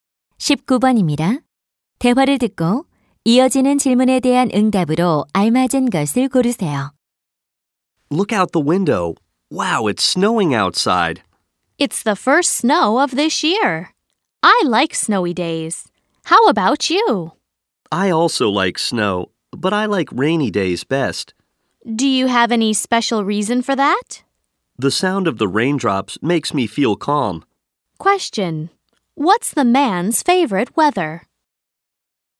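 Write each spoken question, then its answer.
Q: Question. What's the man's favorite weather?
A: Rainy days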